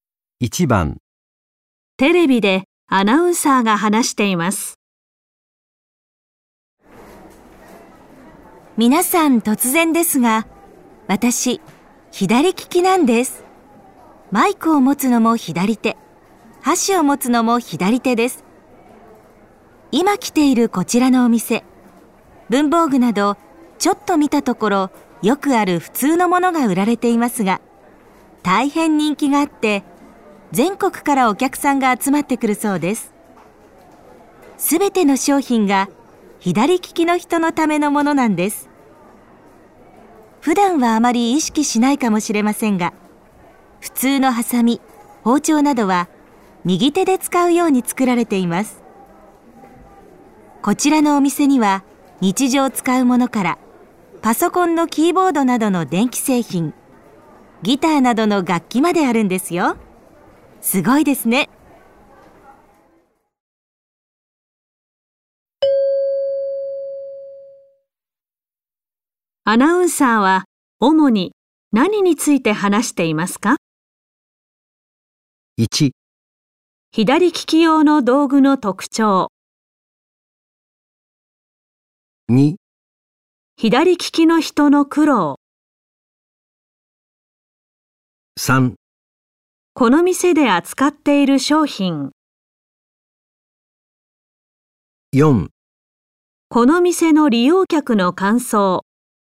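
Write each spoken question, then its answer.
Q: アナウンサーは主に何について話していますか?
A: 3: この店で扱っている商品。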